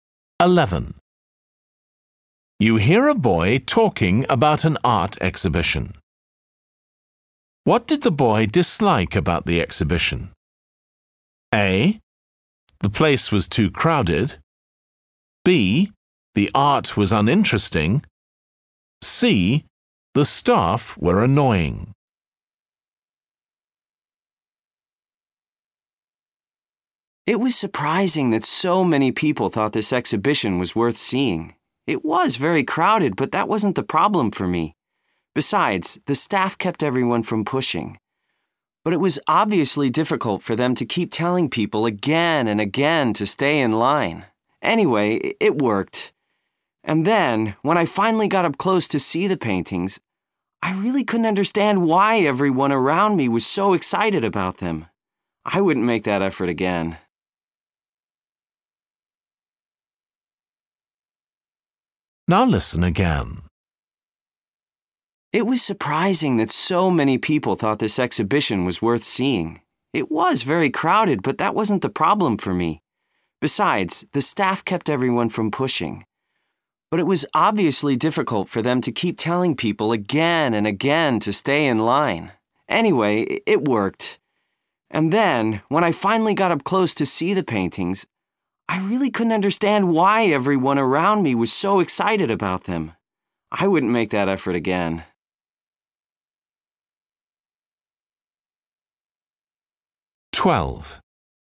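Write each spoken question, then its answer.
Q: What did the boy dislike about the exhibition?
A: B: The art was uninteresting.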